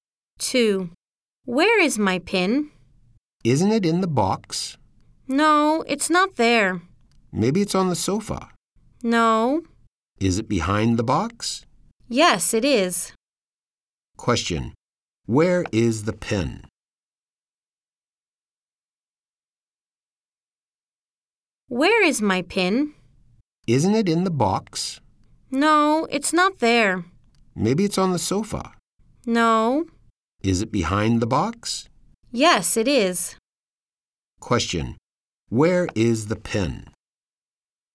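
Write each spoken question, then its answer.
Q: Where is the pin?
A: Behind the box.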